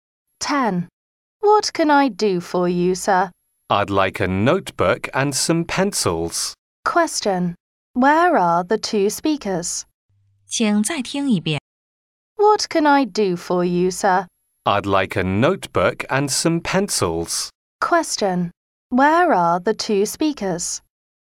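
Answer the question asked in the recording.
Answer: In a shop (stationery shop)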